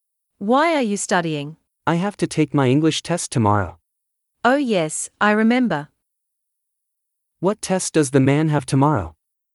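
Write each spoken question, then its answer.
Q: What test does the man have tomorrow?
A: An English test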